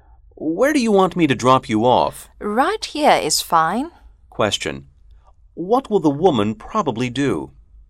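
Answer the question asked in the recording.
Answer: Get out of the car right there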